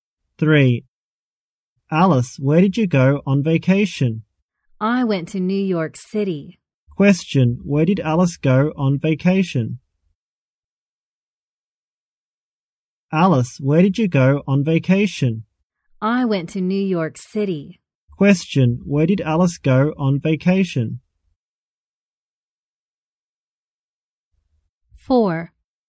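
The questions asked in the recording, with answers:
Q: Where did Alice go on vacation?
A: New York City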